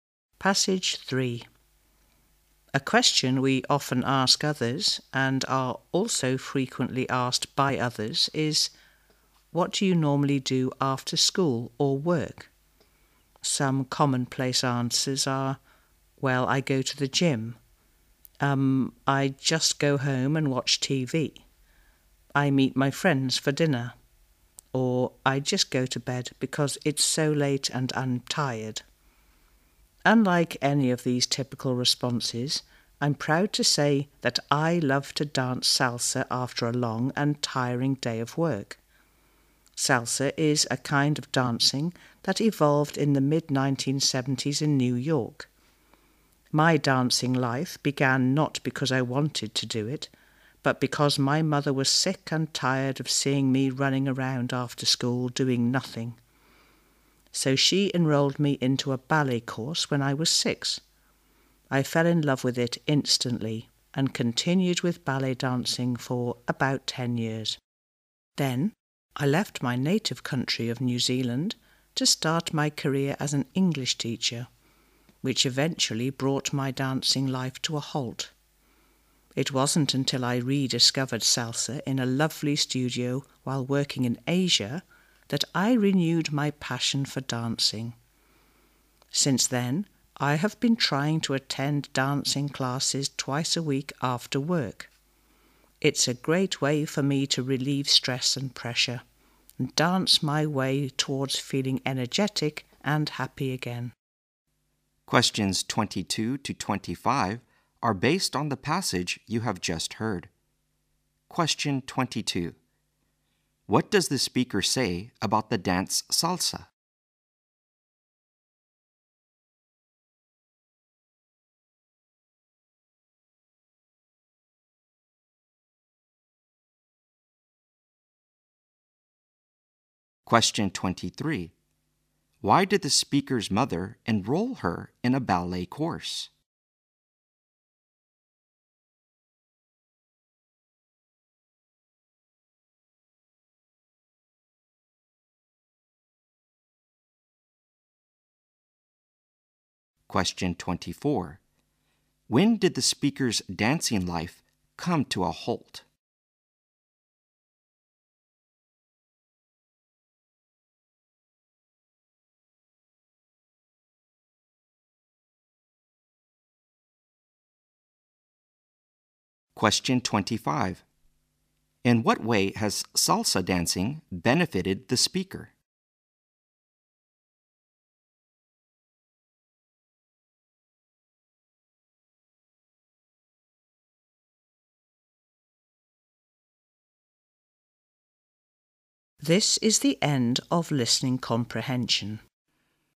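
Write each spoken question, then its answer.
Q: What does the speaker say about the dance salsa?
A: It evolved in the mid-1970s in New York

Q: Why did the speaker's mother enroll her in a ballet course?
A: She was tired of seeing her run around after school doing nothing

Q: When did the speaker's dancing life come to a halt?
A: When she left New Zealand to work as an English teacher

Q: In what way has salsa dancing benefited the speaker?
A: It relieves her stress and makes her energetic and happy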